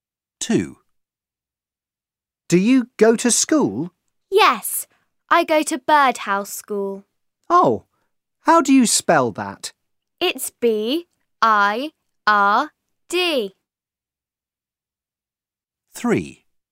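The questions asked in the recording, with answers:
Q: Oh, how do you spell that?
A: Birdhouse School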